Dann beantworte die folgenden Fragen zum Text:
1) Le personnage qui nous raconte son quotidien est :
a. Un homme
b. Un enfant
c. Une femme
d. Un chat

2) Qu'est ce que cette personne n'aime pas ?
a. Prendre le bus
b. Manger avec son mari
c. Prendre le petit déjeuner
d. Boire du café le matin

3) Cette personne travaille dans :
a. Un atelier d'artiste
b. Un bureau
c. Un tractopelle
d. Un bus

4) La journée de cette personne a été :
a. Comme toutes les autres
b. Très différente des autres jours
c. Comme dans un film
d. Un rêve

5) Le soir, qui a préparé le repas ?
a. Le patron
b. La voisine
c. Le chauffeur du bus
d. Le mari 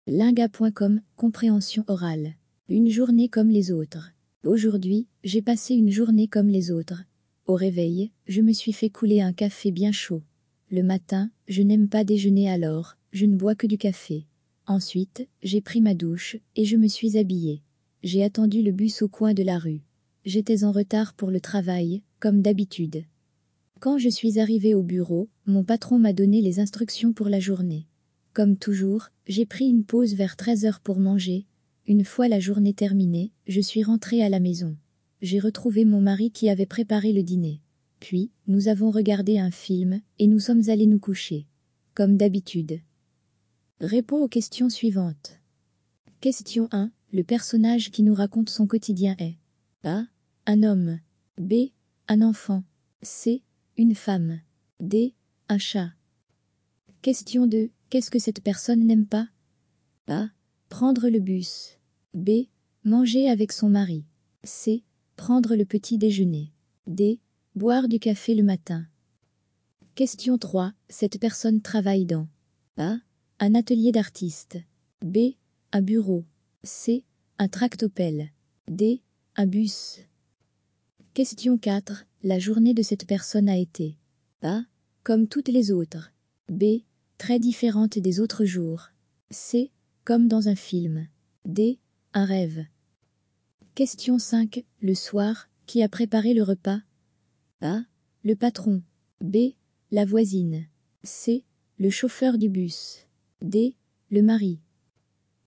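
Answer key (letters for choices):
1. c
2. c
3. b
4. a
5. d

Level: Basis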